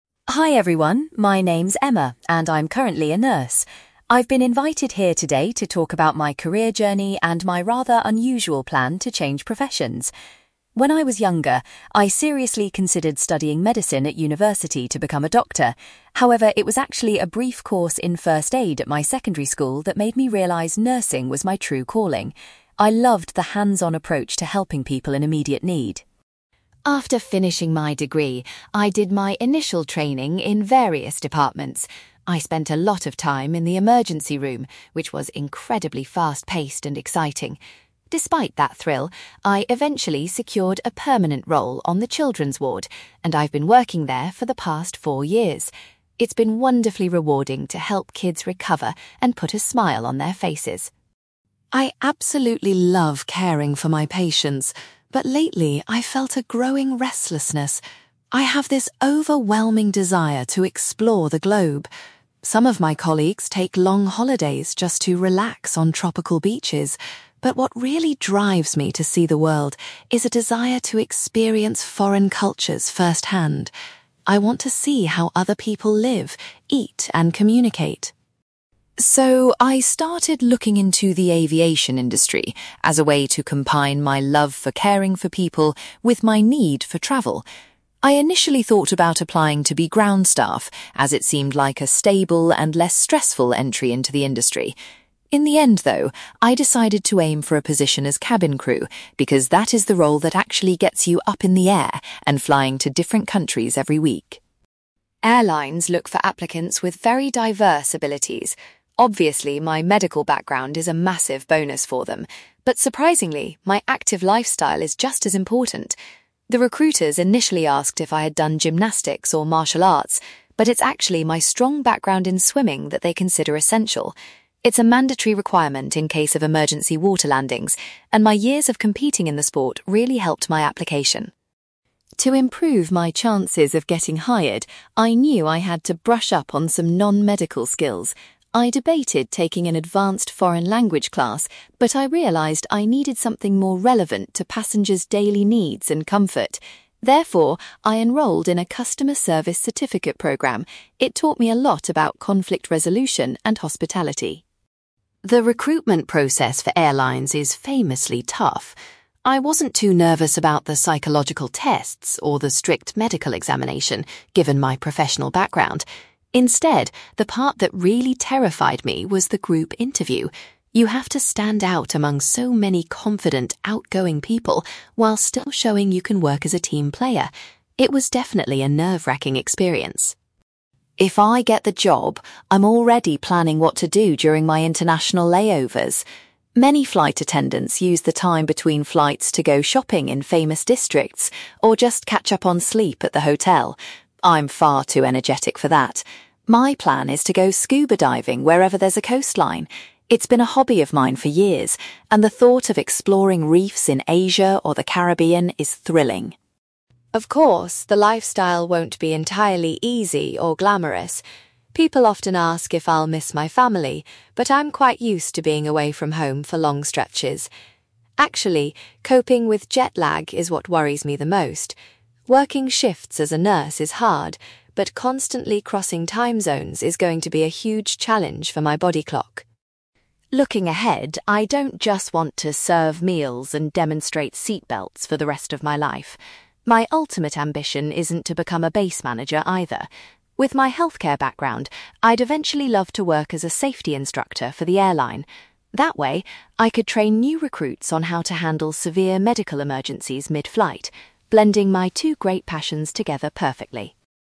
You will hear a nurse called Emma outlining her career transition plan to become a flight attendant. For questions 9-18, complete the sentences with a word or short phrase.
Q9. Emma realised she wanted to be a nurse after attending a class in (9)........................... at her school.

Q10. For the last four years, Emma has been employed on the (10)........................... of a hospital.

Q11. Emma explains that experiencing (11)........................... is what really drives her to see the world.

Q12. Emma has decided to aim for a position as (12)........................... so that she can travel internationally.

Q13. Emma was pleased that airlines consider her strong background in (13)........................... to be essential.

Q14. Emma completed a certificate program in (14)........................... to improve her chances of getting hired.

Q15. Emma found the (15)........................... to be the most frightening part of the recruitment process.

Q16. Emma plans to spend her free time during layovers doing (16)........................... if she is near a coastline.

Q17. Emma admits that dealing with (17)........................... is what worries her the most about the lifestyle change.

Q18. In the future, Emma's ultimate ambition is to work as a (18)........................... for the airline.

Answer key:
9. first aid
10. children's ward
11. foreign cultures
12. cabin crew
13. swimming
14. customer service
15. group interview
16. scuba diving
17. jet lag
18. safety instructor

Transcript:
Emma: Hi everyone, my name is Emma, and I'm currently a nurse. I've been invited here today to talk about my career journey and my rather unusual plan to change professions. When I was younger, I seriously considered studying medicine at university to become a doctor. However, it was actually a brief course in first aid at my secondary school that made me realise nursing was my true calling. I loved the hands-on approach to helping people in immediate need.
After finishing my degree, I did my initial training in various departments. I spent a lot of time in the emergency room, which was incredibly fast-paced and exciting. Despite that thrill, I eventually secured a permanent role on the children's ward, and I've been working there for the past four years. It's been wonderfully rewarding to help kids recover and put a smile on their faces.
I absolutely love caring for my patients, but lately, I've felt a growing restlessness. I have this overwhelming desire to explore the globe. Some of my colleagues take long holidays just to relax on tropical beaches, but what really drives me to see the world is a desire to experience foreign cultures firsthand. I want to see how other people live, eat, and communicate.
So, I started looking into the aviation industry as a way to combine my love for caring for people with my need for travel. I initially thought about applying to be ground staff, as it seemed like a stable and less stressful entry into the industry. In the end, though, I decided to aim for a position as cabin crew, because that is the role that actually gets you up in the air and flying to different countries every week.
Airlines look for applicants with very diverse abilities. Obviously, my medical background is a massive bonus for them. But surprisingly, my active lifestyle is just as important. The recruiters initially asked if I had done gymnastics or martial arts, but it's actually my strong background in swimming that they consider essential. It's a mandatory requirement in case of emergency water landings, and my years of competing in the sport really helped my application.
To improve my chances of getting hired, I knew I had to brush up on some non-medical skills. I debated taking an advanced foreign language class, but I realised I needed something more relevant to passengers' daily needs and comfort. Therefore, I enrolled in a customer service certificate program. It taught me a lot about conflict resolution and hospitality.
The recruitment process for airlines is famously tough. I wasn't too nervous about the psychological tests or the strict medical examination, given my professional background. Instead, the part that really terrified me was the group interview. You have to stand out among so many confident, outgoing people while still showing you can work as a team player. It was definitely a nerve-wracking experience!
If I get the job, I'm already planning what to do during my international layovers. Many flight attendants use the time between flights to go shopping in famous districts or just catch up on sleep at the hotel. I'm far too energetic for that! My plan is to go scuba diving wherever there's a coastline. It's been a hobby of mine for years, and the thought of exploring reefs in Asia or the Caribbean is thrilling.
Of course, the lifestyle won't be entirely easy or glamorous. People often ask if I'll miss my family, but I'm quite used to being away from home for long stretches. Actually, coping with jet lag is what worries me the most. Working shifts as a nurse is hard, but constantly crossing time zones is going to be a huge challenge for my body clock.
Looking ahead, I don't just want to serve meals and demonstrate seatbelts for the rest of my life. My ultimate ambition isn't to become a base manager, either. With my healthcare background, I'd eventually love to work as a safety instructor for the airline. That way, I could train new recruits on how to handle severe medical emergencies mid-flight, blending my two great passions together perfectly.

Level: B2